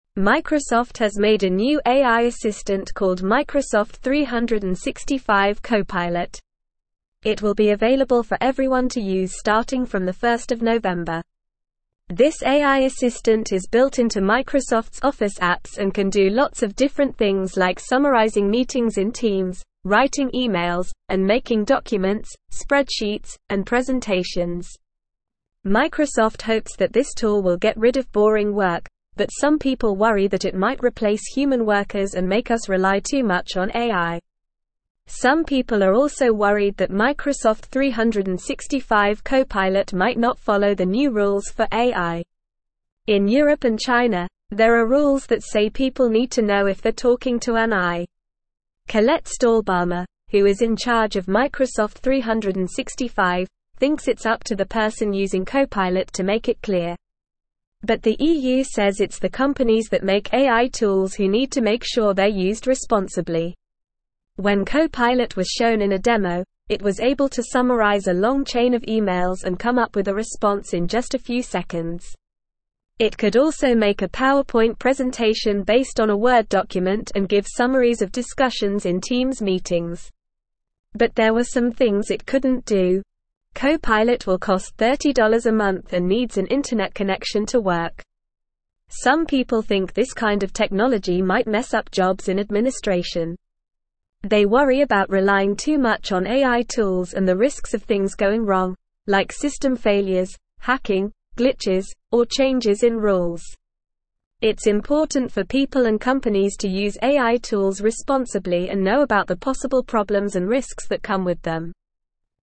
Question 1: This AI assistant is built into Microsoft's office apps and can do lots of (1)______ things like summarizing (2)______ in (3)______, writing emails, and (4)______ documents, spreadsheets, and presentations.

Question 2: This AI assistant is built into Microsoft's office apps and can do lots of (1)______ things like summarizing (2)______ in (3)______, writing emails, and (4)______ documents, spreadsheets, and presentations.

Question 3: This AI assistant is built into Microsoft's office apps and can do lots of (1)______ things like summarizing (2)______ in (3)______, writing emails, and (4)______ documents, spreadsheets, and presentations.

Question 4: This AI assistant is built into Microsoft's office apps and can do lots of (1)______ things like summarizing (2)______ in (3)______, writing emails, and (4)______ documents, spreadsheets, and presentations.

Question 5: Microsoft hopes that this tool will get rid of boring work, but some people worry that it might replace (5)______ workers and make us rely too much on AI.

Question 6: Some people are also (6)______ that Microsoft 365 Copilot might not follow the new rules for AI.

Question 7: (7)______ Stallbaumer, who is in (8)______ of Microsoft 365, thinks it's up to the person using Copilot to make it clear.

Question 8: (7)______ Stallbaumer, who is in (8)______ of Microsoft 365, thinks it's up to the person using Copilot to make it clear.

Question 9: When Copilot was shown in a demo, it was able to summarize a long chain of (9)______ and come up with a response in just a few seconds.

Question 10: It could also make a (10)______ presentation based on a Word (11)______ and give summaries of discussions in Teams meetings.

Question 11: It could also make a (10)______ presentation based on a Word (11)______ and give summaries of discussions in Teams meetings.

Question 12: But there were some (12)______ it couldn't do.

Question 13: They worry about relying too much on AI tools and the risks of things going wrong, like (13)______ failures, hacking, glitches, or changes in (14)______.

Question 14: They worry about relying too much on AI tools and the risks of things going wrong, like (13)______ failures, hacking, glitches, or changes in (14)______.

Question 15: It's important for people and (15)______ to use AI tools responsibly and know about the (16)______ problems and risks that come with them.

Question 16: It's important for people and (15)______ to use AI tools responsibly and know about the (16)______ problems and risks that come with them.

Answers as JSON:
{"1": "different", "2": "meetings", "3": "Teams", "4": "making", "5": "human", "6": "worried", "7": "Colette", "8": "charge", "9": "emails", "10": "PowerPoint", "11": "document", "12": "things", "13": "system", "14": "rules", "15": "companies", "16": "possible"}

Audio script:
Microsoft has made a new AI assistant called Microsoft 365 Copilot. It will be available for everyone to use starting from 1 November. This AI assistant is built into Microsoft's office apps and can do lots of different things like summarizing meetings in Teams, writing emails, and making documents, spreadsheets, and presentations. Microsoft hopes that this tool will get rid of boring work, but some people worry that it might replace human workers and make us rely too much on AI.
Some people are also worried that Microsoft 365 Copilot might not follow the new rules for AI. In Europe and China, there are rules that say people need to know if they're talking to an AI. Colette Stallbaumer, who is in charge of Microsoft 365, thinks it's up to the person using Copilot to make it clear. But the EU says it's the companies that make AI tools who need to make sure they're used responsibly.
When Copilot was shown in a demo, it was able to summarize a long chain of emails and come up with a response in just a few seconds. It could also make a PowerPoint presentation based on a Word document and give summaries of discussions in Teams meetings. But there were some things it couldn't do. Copilot will cost $30 a month and needs an internet connection to work.
Some people think this kind of technology might mess up jobs in administration. They worry about relying too much on AI tools and the risks of things going wrong, like system failures, hacking, glitches, or changes in rules. It's important for people and companies to use AI tools responsibly and know about the possible problems and risks that come with them.

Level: Level 3